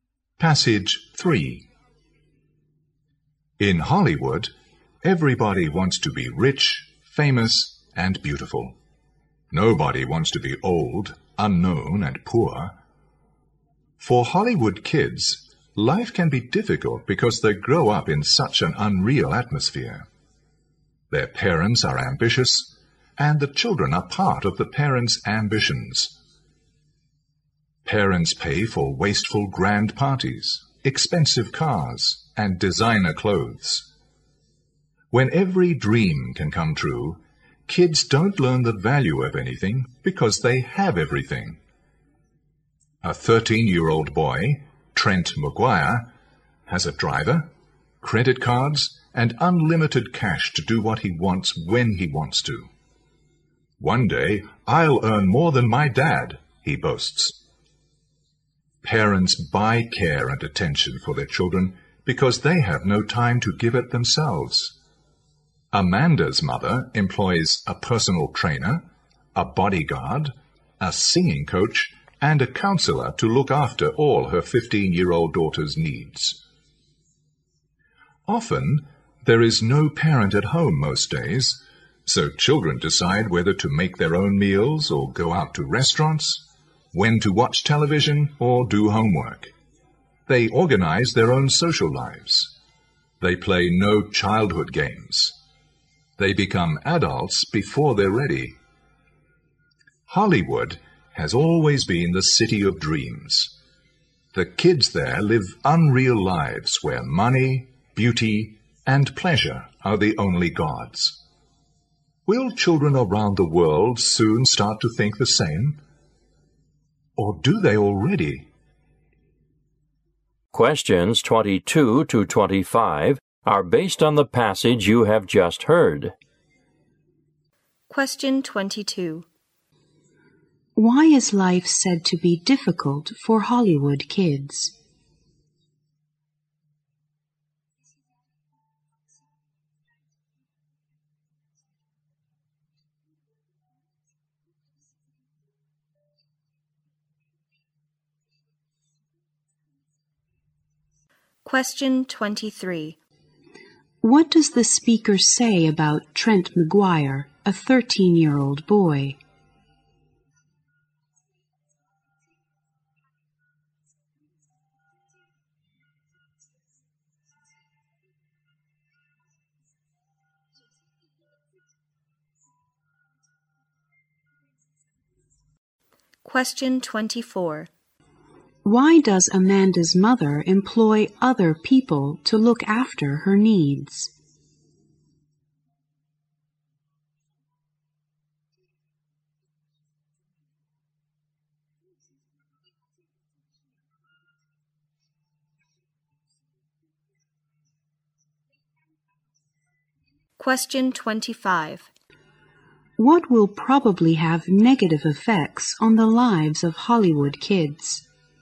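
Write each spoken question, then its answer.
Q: Why is life said to be difficult for Hollywood kids?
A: They grow up in an unreal atmosphere.

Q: What does the speaker say about Trent McGuire, a 13-year-old boy?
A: He has a driver, credit cards, and unlimited cash.

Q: Why does Amanda's mother employ other people to look after her needs?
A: She has no time to look after her daughter herself.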